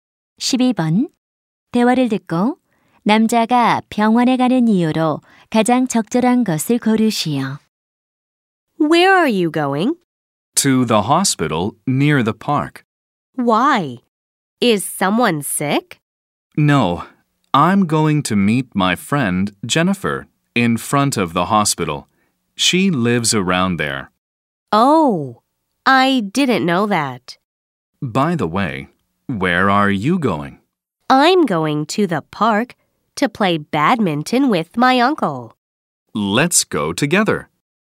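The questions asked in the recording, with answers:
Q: 대화를 듣고 남자가 병원에 가는 이유로 가장 적절한 것을 고르시오.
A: 친구를 만나기 위해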